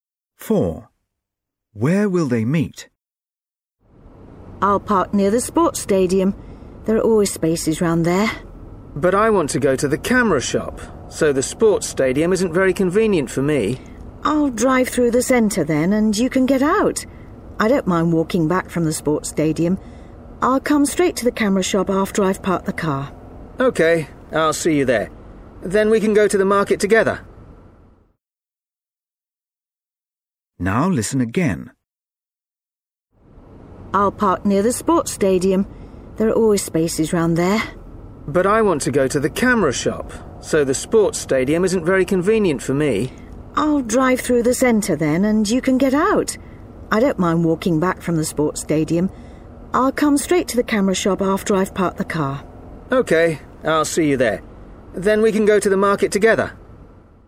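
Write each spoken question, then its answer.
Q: Where will they meet?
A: at the camera shop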